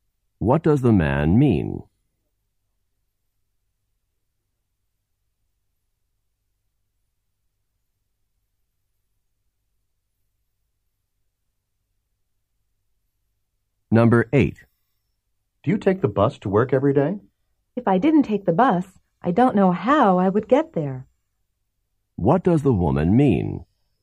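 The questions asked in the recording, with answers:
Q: What does the woman mean?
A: Yes, she takes the bus every day.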